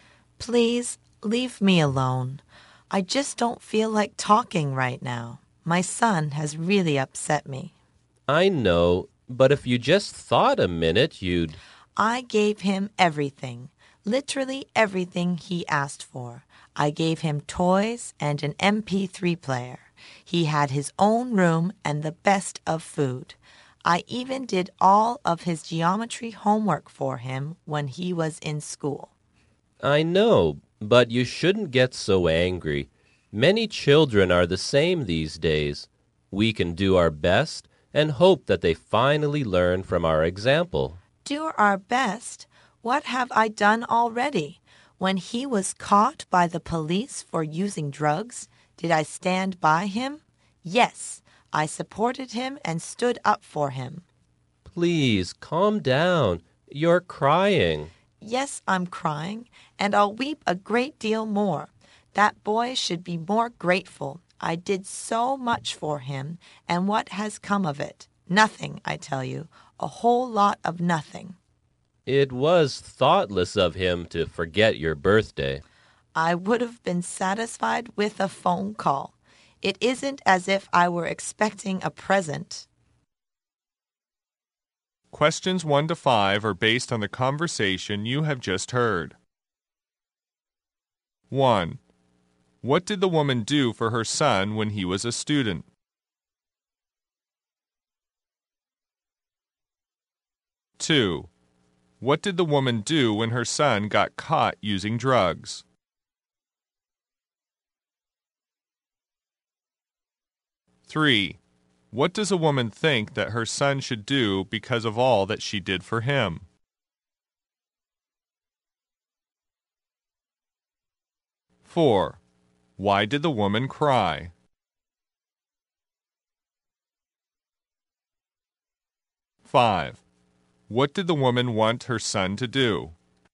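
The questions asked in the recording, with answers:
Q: What did the woman do for her son when he was a student?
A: Did all his geometry homework

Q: What did the woman do when her son got caught using drugs?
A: Supported him and stood up for him

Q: What does a woman think that her son should do because of all that she did for him?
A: Be more grateful

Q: Why did the woman cry?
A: Her son forgot her birthday

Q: What did the woman want her son to do?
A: Give her a phone call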